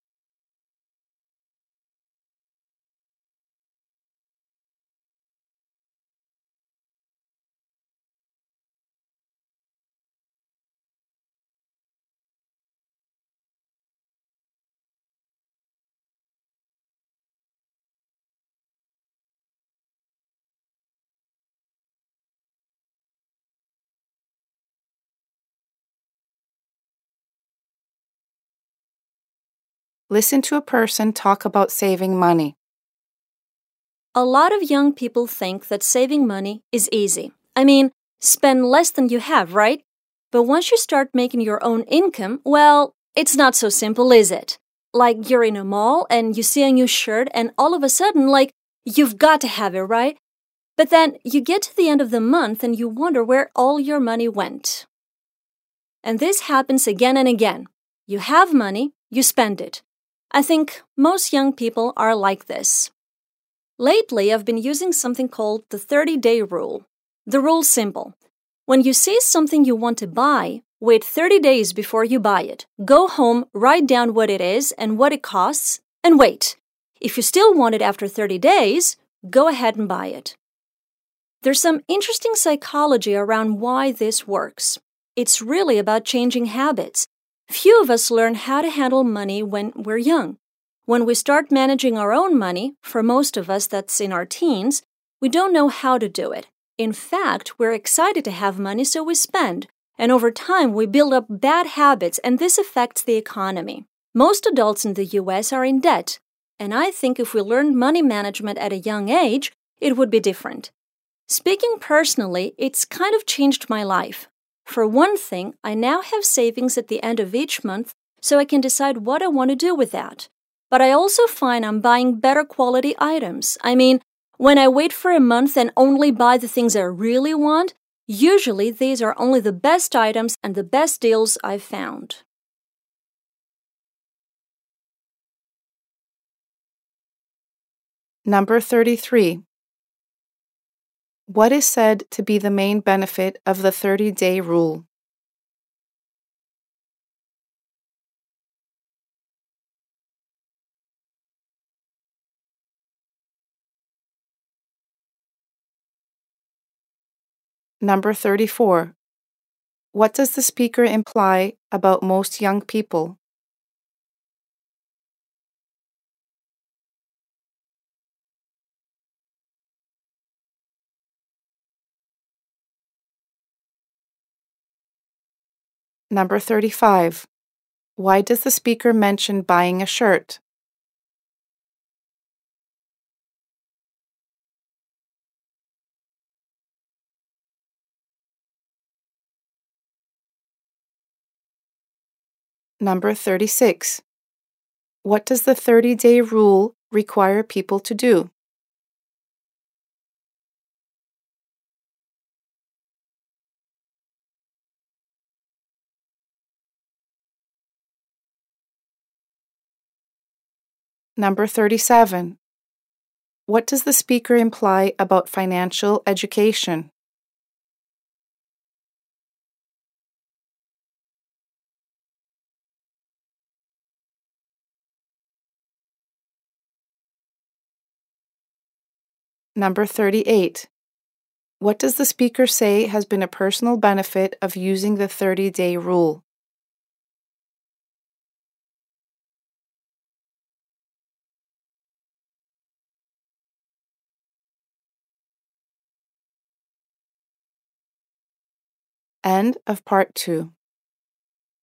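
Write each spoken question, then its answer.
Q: What does the speaker imply about most young people?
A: They spend money as soon as they have it

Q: Why does the speaker mention buying a shirt?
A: To give an example of impulse buying

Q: What does the 30-day rule require people to do?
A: Wait 30 days before buying something they want

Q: What does the speaker imply about financial education?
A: It should be taught at a young age

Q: What does the speaker say has been a personal benefit of using the 30-day rule?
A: Having savings each month and buying better quality items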